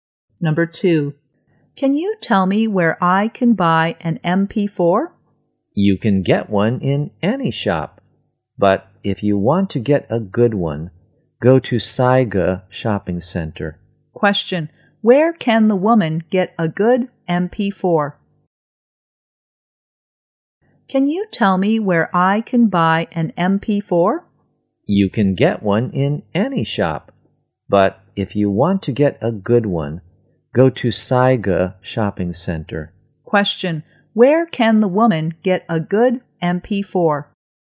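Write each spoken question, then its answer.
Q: where can the woman get a good MP4?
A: At Saiga Shopping Center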